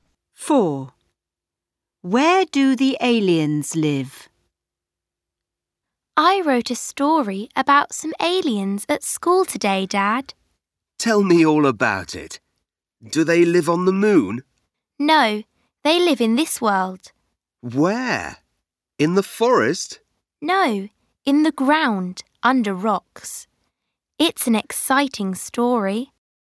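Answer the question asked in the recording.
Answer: in the ground, under rocks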